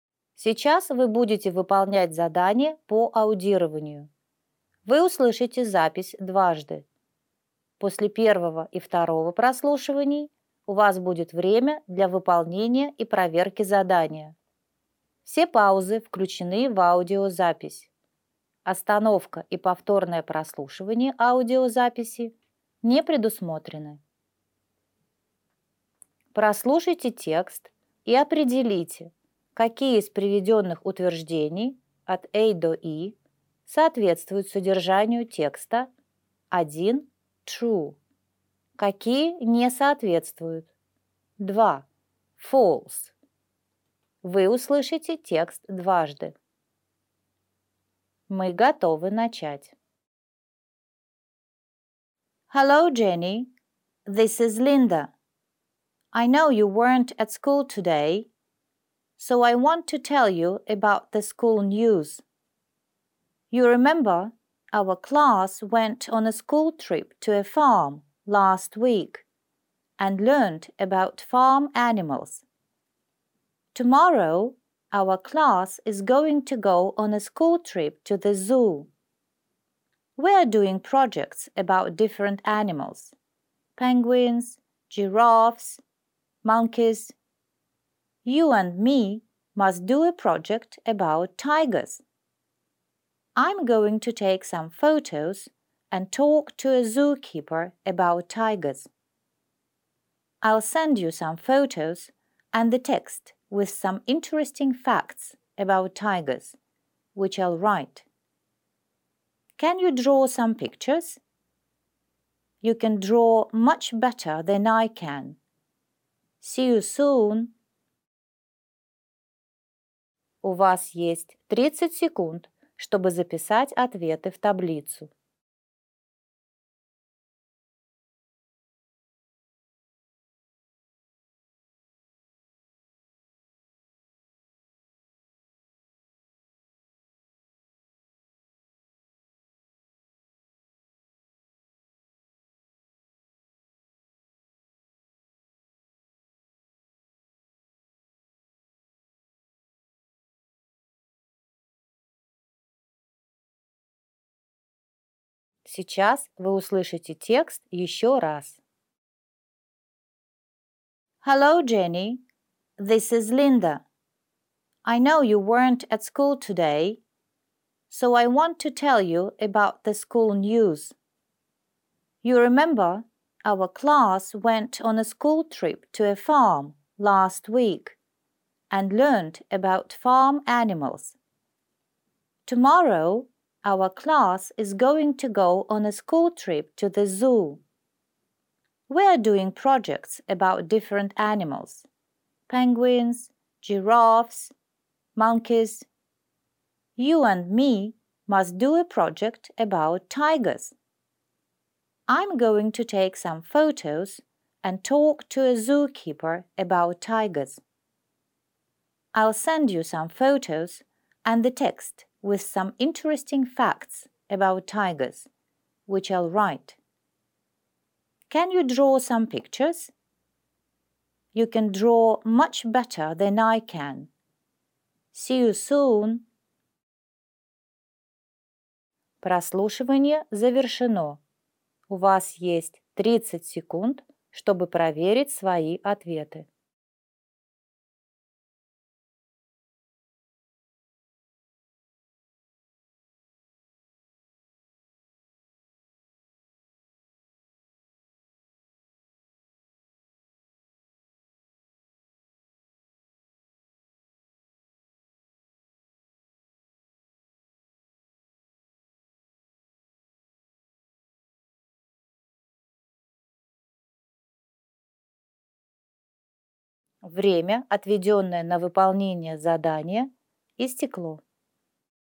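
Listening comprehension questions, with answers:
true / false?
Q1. Jenny went to school today.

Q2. Tomorrow the schoolchildren are going to a farm.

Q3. Jenny and Linda are doing a project about tigers.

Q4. Linda wants to write some interesting facts about tigers.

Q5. Linda asks Jenny to send her some photos of tigers.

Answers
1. false
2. false
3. true
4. true
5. false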